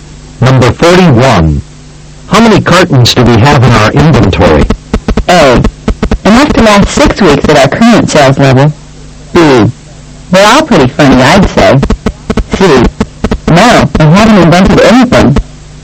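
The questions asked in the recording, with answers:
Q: How many cartons do we have in our inventory?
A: A: Enough to last 6 weeks at our current sales level.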